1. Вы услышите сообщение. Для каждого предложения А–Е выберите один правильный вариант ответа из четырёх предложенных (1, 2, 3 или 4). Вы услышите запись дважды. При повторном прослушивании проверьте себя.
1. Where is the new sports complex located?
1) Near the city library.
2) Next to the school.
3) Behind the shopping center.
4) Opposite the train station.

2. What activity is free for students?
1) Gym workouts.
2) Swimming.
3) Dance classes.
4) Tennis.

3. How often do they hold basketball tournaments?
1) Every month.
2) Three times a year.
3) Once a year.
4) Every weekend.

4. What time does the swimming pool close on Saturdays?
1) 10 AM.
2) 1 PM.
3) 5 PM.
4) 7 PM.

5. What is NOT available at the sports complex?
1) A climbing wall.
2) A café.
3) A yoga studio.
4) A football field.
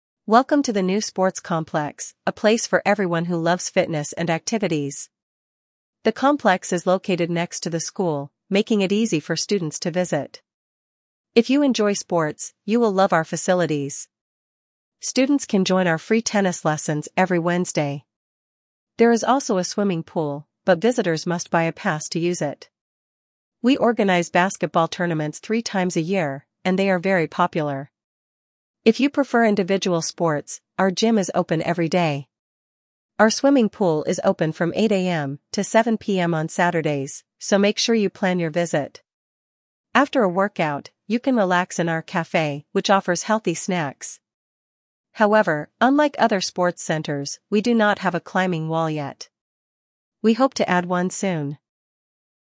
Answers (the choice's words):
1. Next to the school.
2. Tennis.
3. Three times a year.
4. 7 PM.
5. A climbing wall.

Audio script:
«Welcome to the new sports complex, a place for everyone who loves fitness and activities! The complex is located next to the school, making it easy for students to visit.
If you enjoy sports, you will love our facilities. Students can join our free tennis lessons every Wednesday. There is also a swimming pool, but visitors must buy a pass to use it.
We organize basketball tournaments three times a year, and they are very popular. If you prefer individual sports, our gym is open every day.
Our swimming pool is open from 8 AM to 7 PM on Saturdays, so make sure you plan your visit. After a workout, you can relax in our café, which offers healthy snacks.
However, unlike other sports centers, we do not have a climbing wall yet. We hope to add one soon!»
A

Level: 8 класс